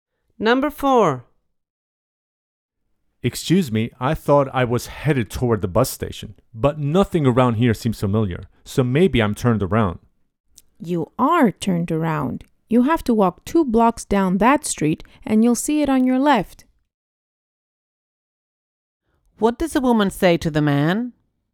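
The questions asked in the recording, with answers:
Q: What does a woman say to the man?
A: He is going the wrong way; the bus station is 2 blocks down on the left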